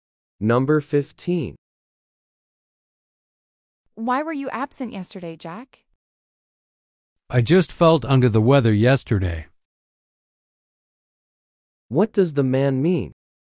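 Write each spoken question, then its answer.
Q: What does the man mean?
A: He was sick.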